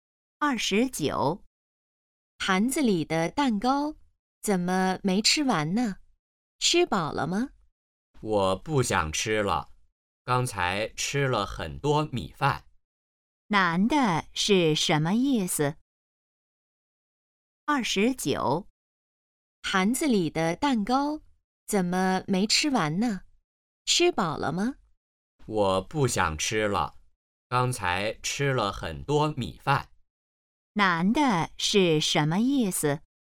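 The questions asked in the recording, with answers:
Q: 男的是什么意思?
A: 吃饱了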